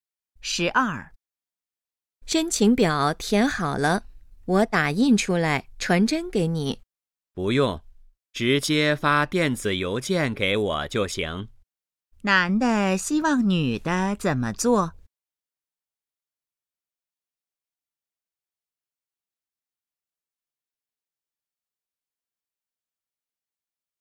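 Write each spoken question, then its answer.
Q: 男的希望女的怎么做?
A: 发电子邮件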